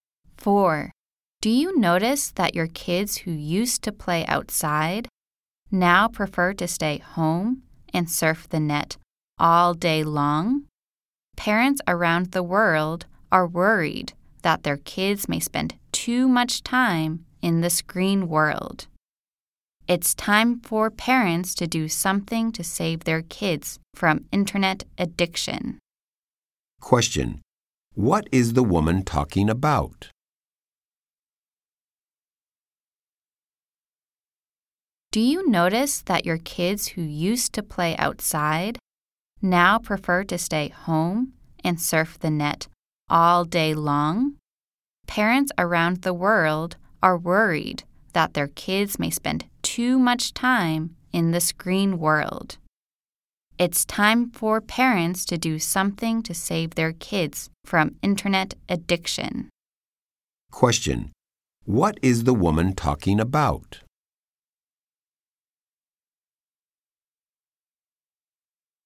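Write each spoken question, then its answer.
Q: What is the woman talking about?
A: Kids' internet addiction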